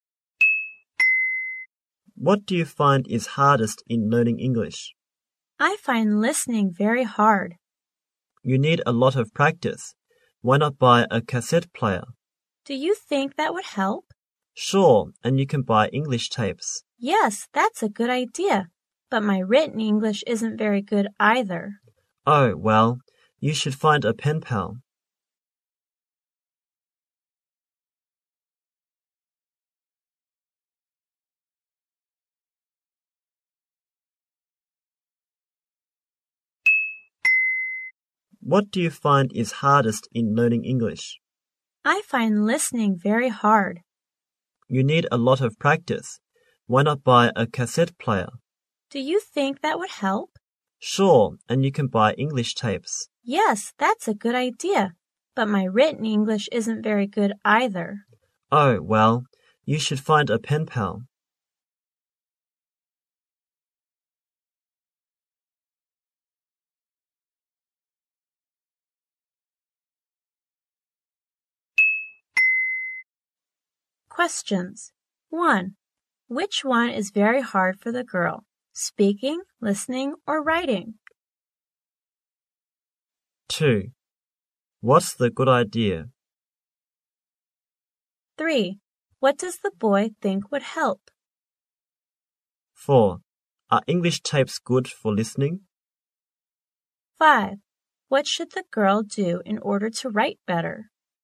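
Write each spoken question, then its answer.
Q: Which one is very hard for the girl?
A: Listening

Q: Are English tapes good for listening?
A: Yes

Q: What should the girl do in order to write better?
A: Find a pen pal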